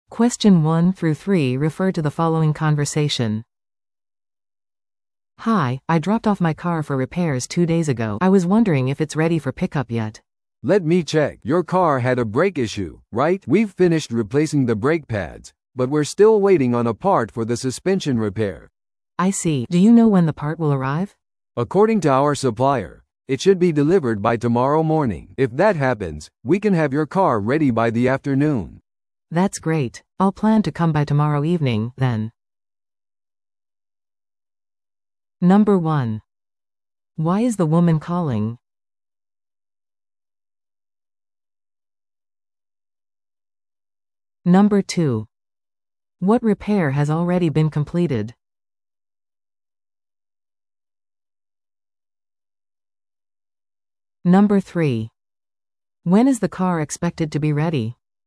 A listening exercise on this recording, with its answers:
Listen to the audio below and answer the questions.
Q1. Why is the woman calling?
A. 車の点検を予約するため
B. 修理状況を確認するため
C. 修理費用の見積もりを依頼するため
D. 修理の予約をキャンセルするため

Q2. What repair has already been completed?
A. エンジン調整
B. ブレーキパッドの交換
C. サスペンション修理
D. エアコンの修理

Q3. When is the car expected to be ready?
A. 今夜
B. 明日の午後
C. 来週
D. 3日後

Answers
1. B. 修理状況を確認するため
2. B. ブレーキパッドの交換
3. B. 明日の午後

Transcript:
A: "Hi, I dropped off my car for repairs two days ago. I was wondering if it's ready for pickup yet."
B: "Let me check... Your car had a brake issue, right? We've finished replacing the brake pads, but we're still waiting on a part for the suspension repair."
A: "I see. Do you know when the part will arrive?"
B: "According to our supplier, it should be delivered by tomorrow morning. If that happens, we can have your car ready by the afternoon."
A: "That's great! I'll plan to come by tomorrow evening, then."

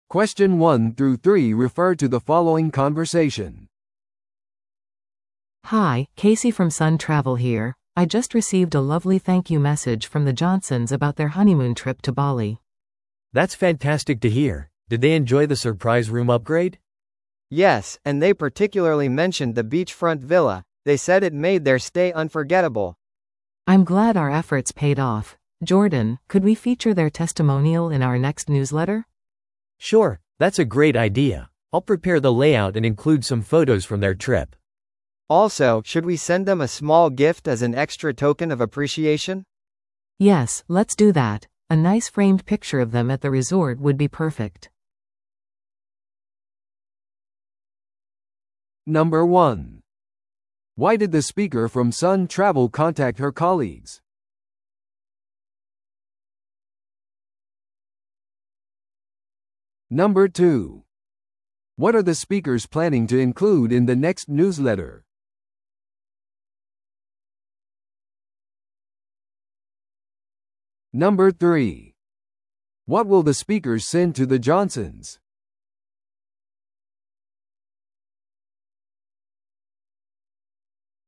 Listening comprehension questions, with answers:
Listen to the audio below and answer the questions.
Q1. Why did the speaker from Sun Travel contact her colleagues?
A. 旅行に関する苦情を話し合うため。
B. 顧客のフィードバックを共有するため。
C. 新しい新婚旅行パッケージを計画するため。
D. 予約エラーを報告するため。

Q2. What are the speakers planning to include in the next newsletter?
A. 特別割引の告知。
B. 初めて旅行する人へのアドバイス。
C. 顧客からの推薦と写真。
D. 新しい旅行規制に関する情報。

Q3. What will the speakers send to the Johnsons?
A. 個人向けの旅行スケジュール。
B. 旅行からの写真を額装したもの。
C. 別の旅行の無料チケット。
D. 未来の旅行のためのガイドブック。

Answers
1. B. 顧客のフィードバックを共有するため。
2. C. 顧客からの推薦と写真。
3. B. 旅行からの写真を額装したもの。

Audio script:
A: Hi, Casey from Sun Travel here. I just received a lovely thank-you message from the Johnsons about their honeymoon trip to Bali.
B: That's fantastic to hear! Did they enjoy the surprise room upgrade?
C: Yes, and they particularly mentioned the beachfront villa. They said it made their stay unforgettable.
A: I'm glad our efforts paid off. Jordan, could we feature their testimonial in our next newsletter?
B: Sure, that's a great idea. I'll prepare the layout and include some photos from their trip.
C: Also, should we send them a small gift as an extra token of appreciation?
A: Yes, let's do that. A nice framed picture of them at the resort would be perfect.

